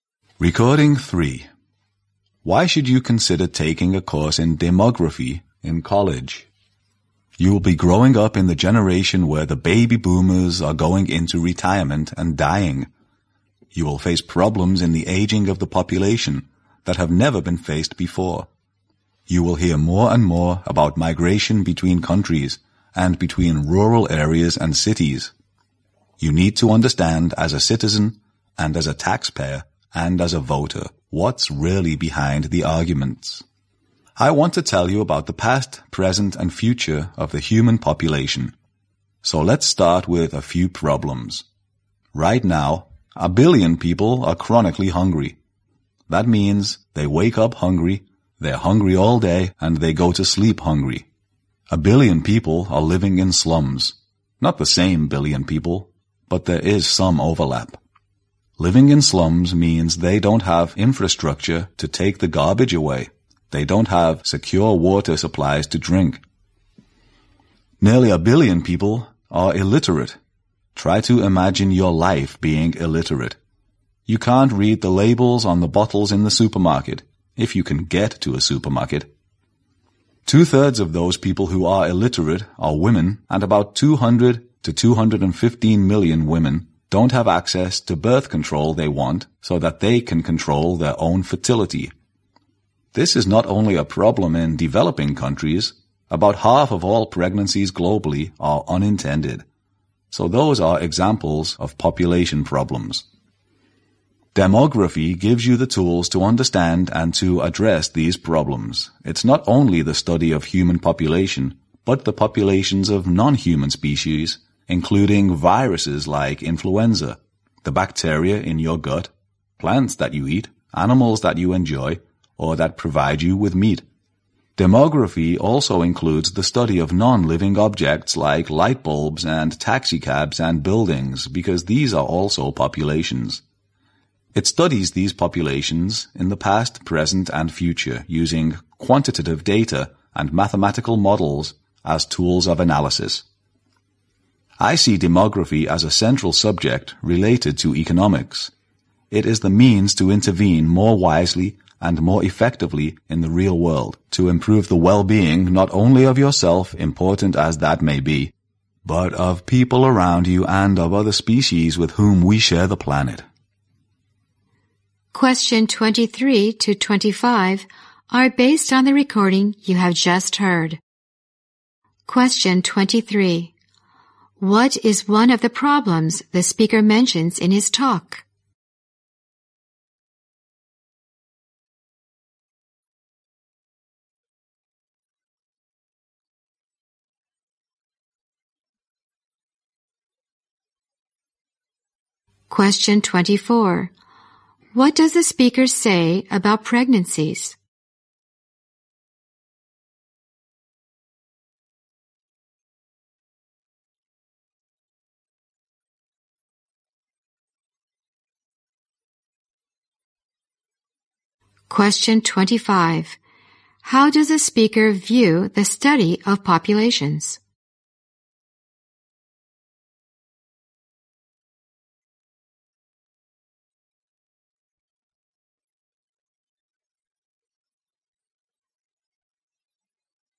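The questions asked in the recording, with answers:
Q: What does the speaker say about pregnancies?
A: About half of all pregnancies globally are unintended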